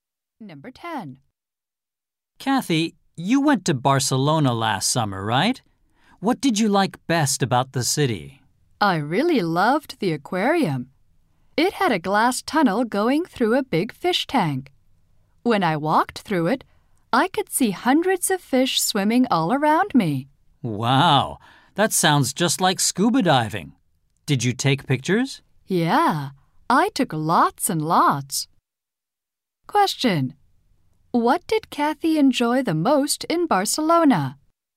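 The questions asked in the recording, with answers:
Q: What did Kathy enjoy the most in Barcelona?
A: The aquarium.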